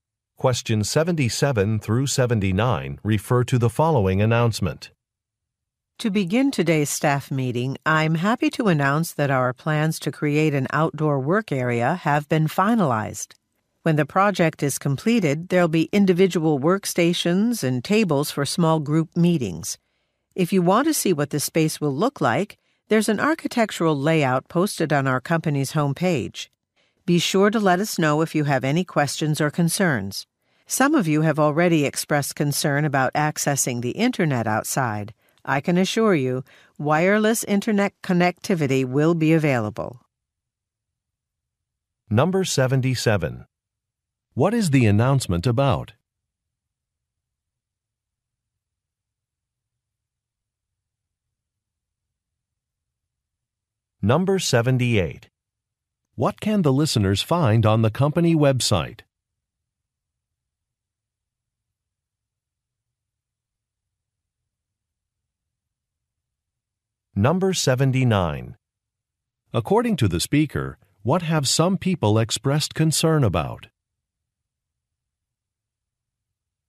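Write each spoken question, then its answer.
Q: What is the announcement about?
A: Plans for an outdoor work area

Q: What can the listeners find on the company website?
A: An architectural layout

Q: According to the speaker, what have some people expressed concern about?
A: Internet access outside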